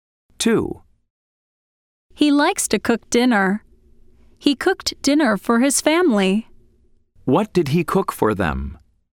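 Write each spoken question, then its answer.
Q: What did he cook for them?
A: dinner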